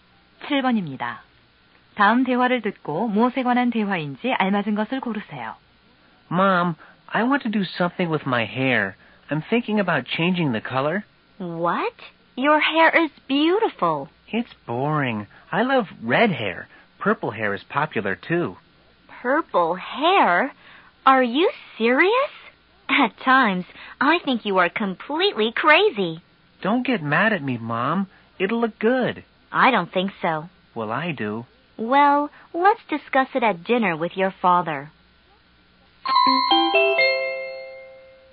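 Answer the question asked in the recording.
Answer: 머리 염색(머리 색 바꾸기)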